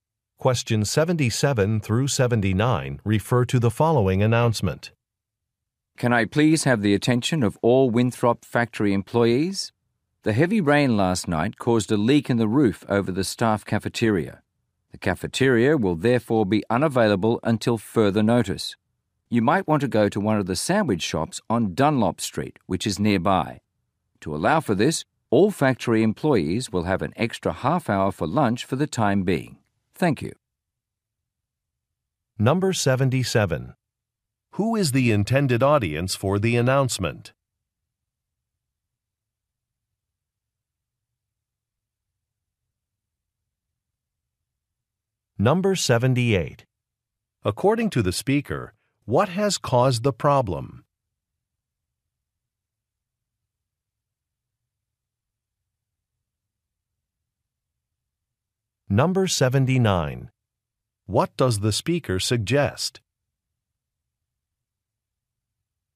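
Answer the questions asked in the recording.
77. Factory employees
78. Heavy rain caused a roof leak
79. Going to sandwich shops on Dunlop Street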